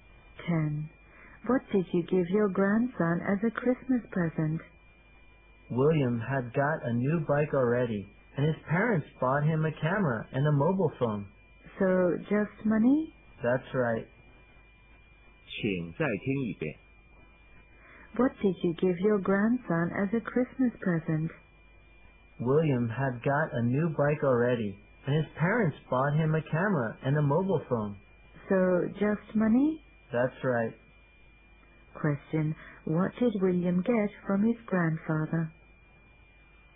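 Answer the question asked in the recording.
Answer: Money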